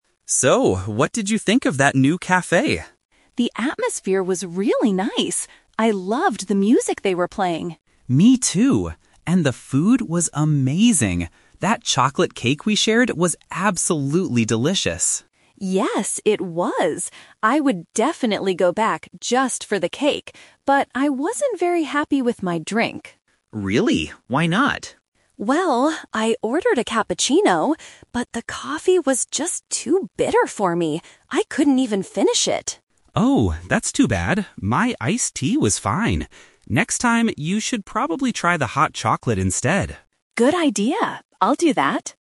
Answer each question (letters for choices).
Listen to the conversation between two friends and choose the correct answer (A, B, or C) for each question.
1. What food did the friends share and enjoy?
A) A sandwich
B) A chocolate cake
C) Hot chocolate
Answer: B

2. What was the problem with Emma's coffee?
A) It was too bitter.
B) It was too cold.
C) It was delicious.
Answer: A

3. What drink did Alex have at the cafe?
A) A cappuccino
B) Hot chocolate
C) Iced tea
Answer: C

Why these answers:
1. Alex says, "That chocolate cake we shared was absolutely delicious," and Emma agrees. Option (C) is a trap; hot chocolate is mentioned at the end, but as a drink for next time. Option (A) is plausible for a cafe but is never mentioned.
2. Emma clearly states that her coffee "was just too bitter for me." Option (C) is a trap; "delicious" is used in the conversation, but it describes the cake, not the coffee. Option (B) is a common complaint about coffee but is not mentioned here.
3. When Emma complains about her drink, Alex says, "My iced tea was fine." Option (A) is a trap; a cappuccino is what Emma ordered, not Alex. Option (B) is also a trap; Alex suggests hot chocolate for Emma's next visit.

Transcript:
Alex: So, what did you think of that new cafe?
Emma: The atmosphere was really nice. I loved the music they were playing.
Alex: Me too. And the food was amazing. That chocolate cake we shared was absolutely delicious.
Emma: Yes, it was! I would definitely go back just for the cake. But I wasn't very happy with my drink.
Alex: Really? Why not?
Emma: Well, I ordered a cappuccino, but the coffee was just too bitter for me. I couldn't even finish it.
Alex: Oh, that's too bad. My iced tea was fine. Next time, you should probably try the hot chocolate instead.